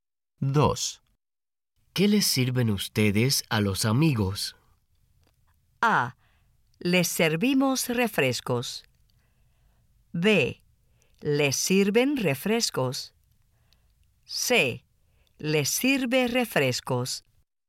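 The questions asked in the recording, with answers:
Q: ¿Qué les sirven ustedes a los amigos?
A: A: Les servimos refrescos.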